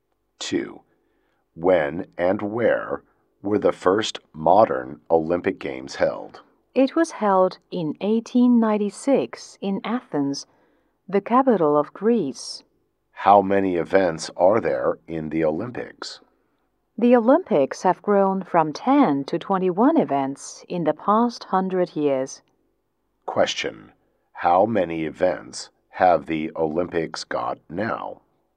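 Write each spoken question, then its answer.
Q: How many events have the Olympics got now?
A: 21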